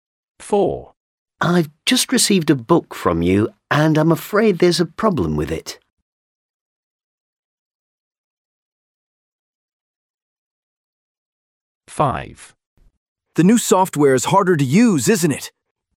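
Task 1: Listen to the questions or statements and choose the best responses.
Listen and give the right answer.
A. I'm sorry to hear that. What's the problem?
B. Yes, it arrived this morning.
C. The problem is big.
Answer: A. I'm sorry to hear that. What's the problem?

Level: A2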